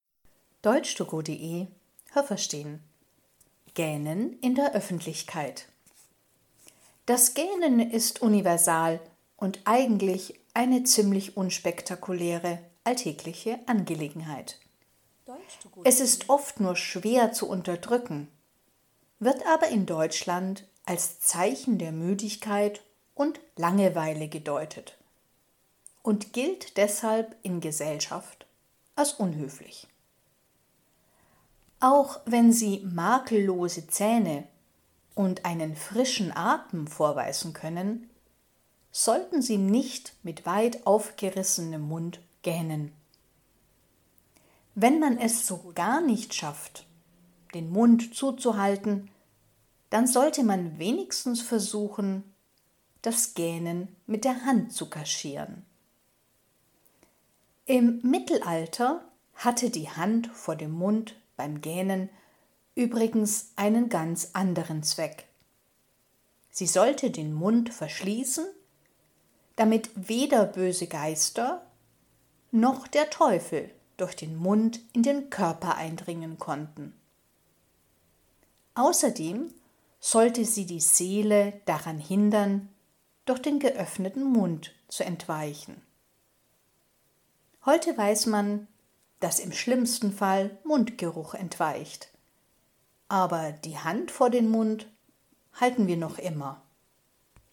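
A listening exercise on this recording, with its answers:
Haben Sie das gehört? Stimmt diese Aussage?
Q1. Auf der ganzen Welt wird gegähnt.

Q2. Es ist nicht schwer, das Gähnen zu unterdrücken.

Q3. Gähnen ist in Deutschland unhöflich, weil man denkt, dass die Person sich langweilt.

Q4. Nur wenn man schöne Zähne und frischen Atem hat, darf man den Mund beim Gähnen weit öffnen.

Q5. Beim Gähnen hält man die Hand vor den Mund.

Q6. Im Mittelalter hielt man die Hand vor den Mund, damit die Seele nicht in den Körper eindringen konnte.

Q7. Menschen mit Mundgeruch sollten die Hand immer vor den Mund halten.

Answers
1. Richtig
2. Falsch
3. Richtig
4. Falsch
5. Richtig
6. Falsch
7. Falsch

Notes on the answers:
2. Man kann es nur schwer unterdrücken, das heißt nur mit viel Mühe.
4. Das sollte man auch mit schönen Zähnen und gutem Atem nicht tun.
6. Die Seele, die man im Körper vermutete, sollte den Körper nicht verlassen. 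Böse Geister und der Teufel sollten nicht eindringen.
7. Der Text sagt nur, man weiß heute, dass keine Seele entweicht, sondern höchstens Mundgeruch.

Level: B (mittel)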